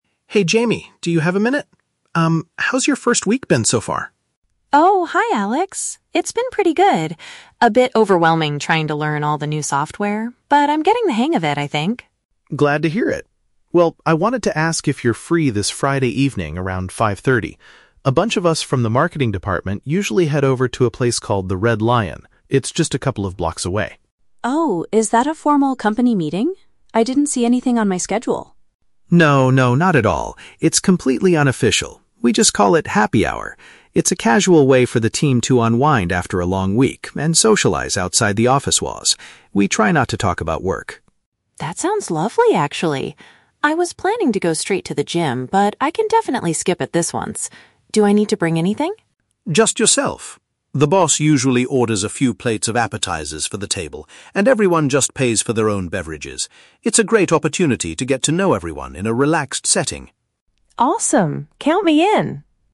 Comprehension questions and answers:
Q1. What is the main purpose of the Friday evening event?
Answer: To help employees relax and bond with each other.

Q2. What was Jamie originally intending to do on Friday after work?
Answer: Do some physical exercise at a fitness center.

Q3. How is the cost of the "Happy Hour" handled?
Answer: Staff members buy their own drinks and share provided snacks.

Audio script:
Alex: Hey Jamie, do you have a minute? Um, how's your first week been so far?
Jamie: Oh, hi Alex! It's been pretty good. A bit overwhelming trying to learn all the new software, but I'm getting the hang of it, I think.
Alex: Glad to hear it. Well, I wanted to ask if you're free this Friday evening around 5:30. A bunch of us from the marketing department usually head over to a place called The Red Lion. It's just a couple of blocks away.
Jamie: Oh, is that a formal company meeting? I didn't see anything on my schedule.
Alex: No, no, not at all! It's completely unofficial. We just call it "Happy Hour." It's a casual way for the team to unwind after a long week and socialize outside the office walls. We try not to talk about work.
Jamie: That sounds lovely, actually. I was planning to go straight to the gym, but I can definitely skip it this once. Do I need to bring anything?
Alex: Just yourself! The boss usually orders a few plates of appetizers for the table, and everyone just pays for their own beverages. It's a great opportunity to get to know everyone in a relaxed setting.